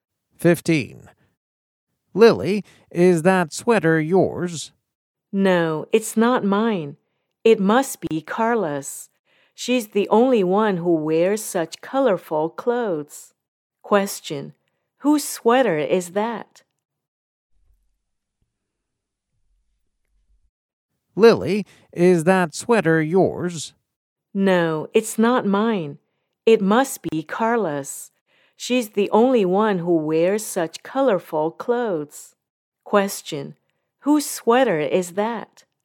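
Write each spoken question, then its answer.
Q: Whose sweater is that?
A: Carla's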